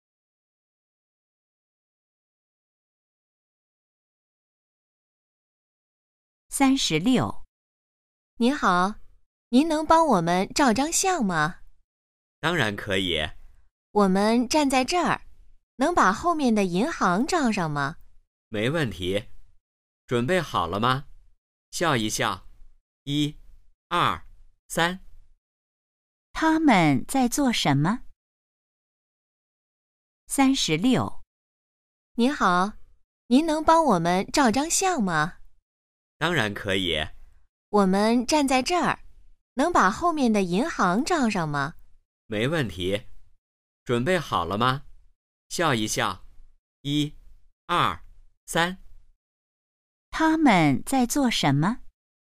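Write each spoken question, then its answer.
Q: 他们在做什么?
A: 照相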